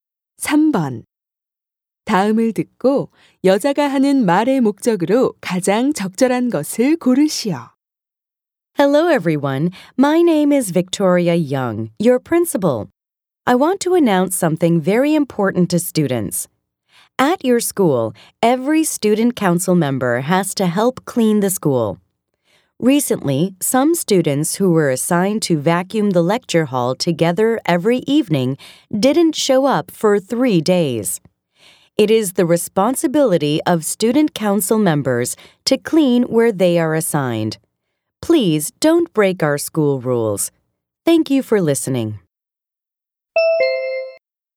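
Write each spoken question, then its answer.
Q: 다음을 듣고 여자가 하는 말의 목적으로 가장 적절한 것을 고르시오.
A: 학생회 학생들에게 배정된 청소 구역을 청소할 것을 당부하려고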